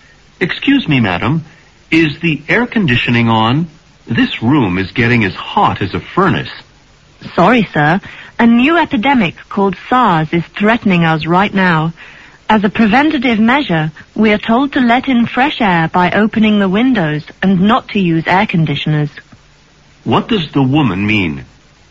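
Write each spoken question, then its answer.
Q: What does the woman mean?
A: The air conditioning is off; windows are opened for fresh air to prevent SARS.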